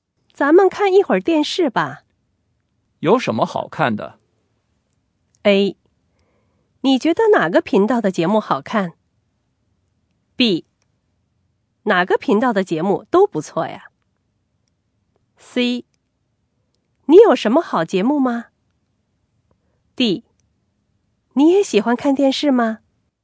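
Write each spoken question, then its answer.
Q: 有什么好看的?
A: B: 哪个频道的节目都不错呀。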